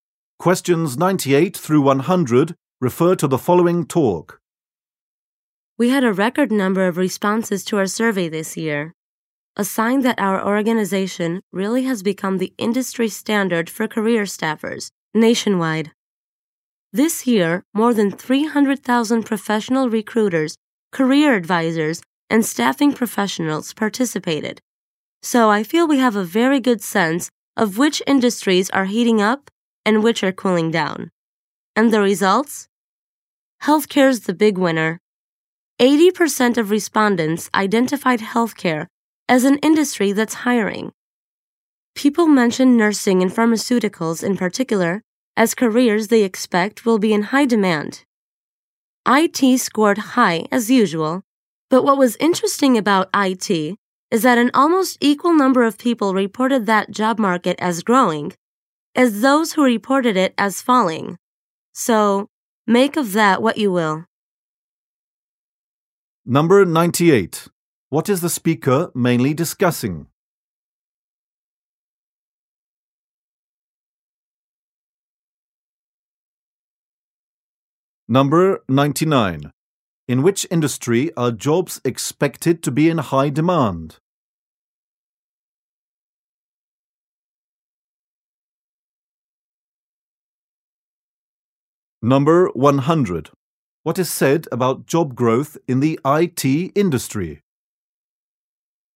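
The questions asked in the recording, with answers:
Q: What is the speaker mainly discussing?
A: Survey results on job markets

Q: In which industry are jobs expected to be in high demand?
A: Healthcare

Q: What is said about job growth in the IT industry?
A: Opinions are evenly split on whether it is growing or falling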